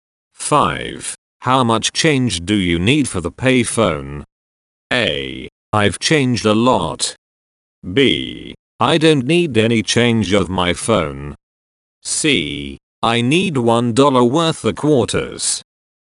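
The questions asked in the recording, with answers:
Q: How much change do you need for the payphone?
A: C: I need $1 worth of quarters.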